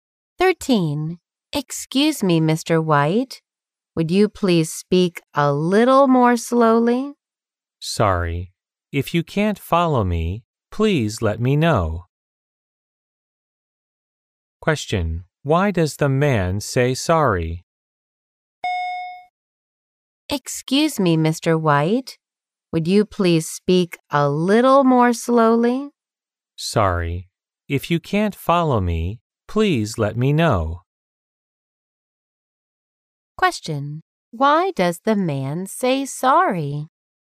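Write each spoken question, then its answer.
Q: Why does the man say sorry?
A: Because he spoke too fast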